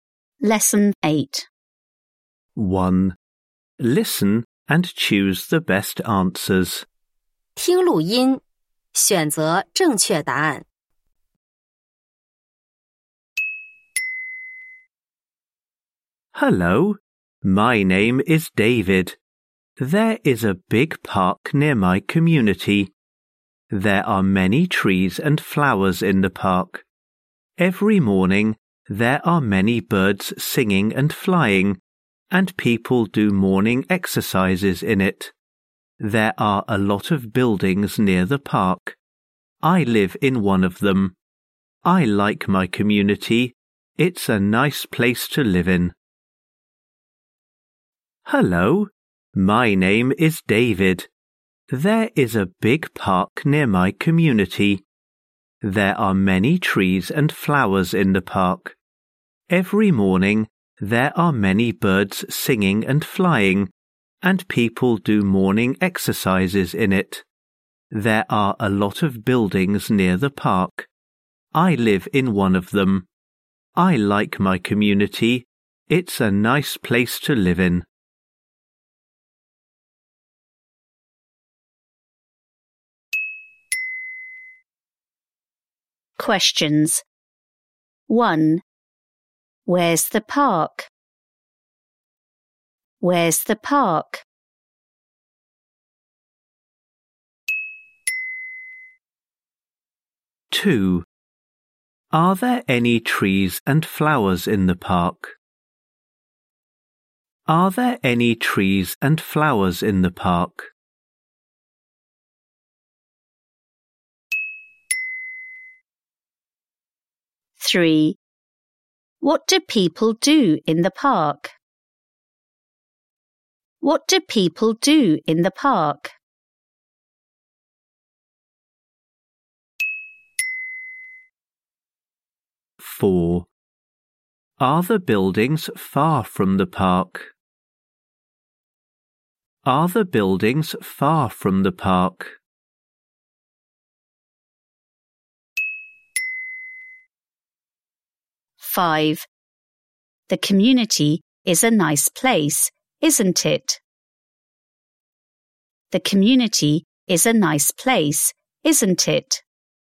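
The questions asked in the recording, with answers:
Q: Where's the park?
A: Near David's community.

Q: Are there any trees and flowers in the park?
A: Yes, there are.

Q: What do people do in the park?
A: They do morning exercises.

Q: Are the buildings far from the park?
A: No, they are near the park.

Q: The community is a nice place, isn't it?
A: Yes, it is.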